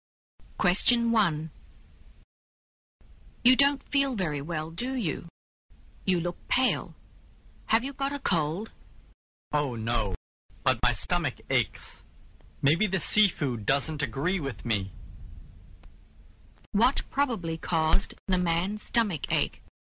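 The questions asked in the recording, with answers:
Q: What probably caused the man's stomach ache?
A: The seafood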